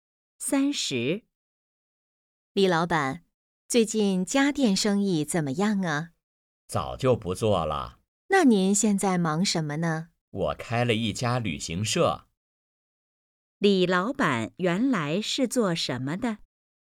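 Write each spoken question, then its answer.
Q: 李老板原来是做什么的?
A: 做家电生意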